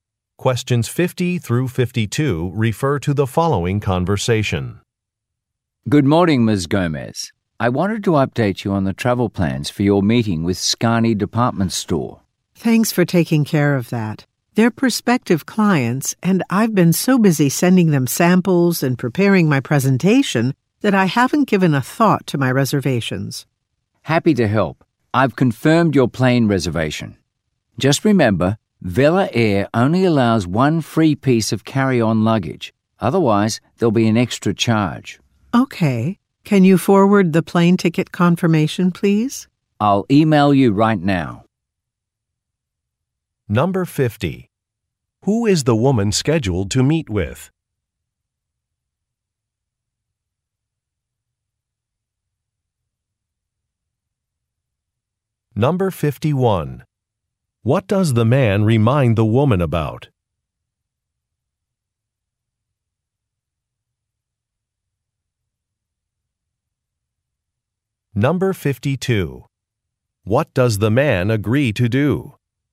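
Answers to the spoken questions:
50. Prospective clients (Scani Department Store)
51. The airline allows only one free carry-on bag
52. Email the plane ticket confirmation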